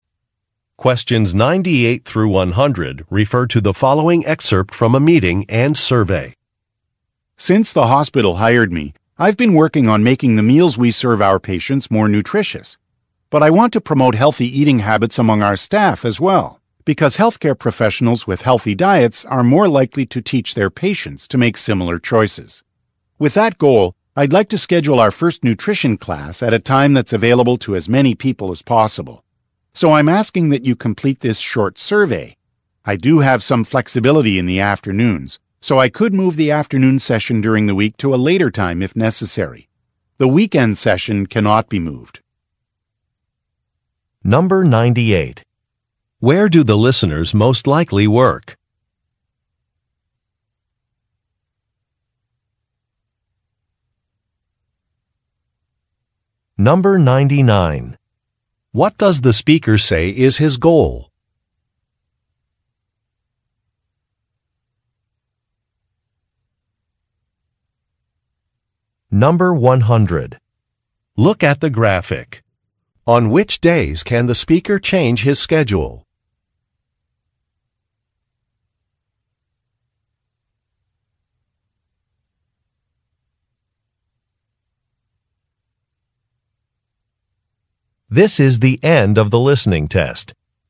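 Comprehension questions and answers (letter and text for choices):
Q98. Where do the listeners most likely work?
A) At a supermarket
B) At a hospital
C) At a community center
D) At a fitness club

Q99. What does the speaker say is his goal?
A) To attract qualified job candidates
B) To reduce costs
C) To boost membership sales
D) To encourage healthy eating habits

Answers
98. B) At a hospital
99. D) To encourage healthy eating habits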